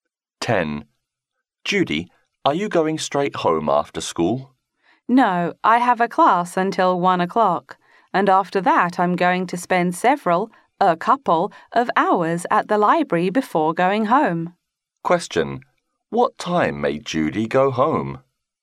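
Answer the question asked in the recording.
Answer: About 3 o'clock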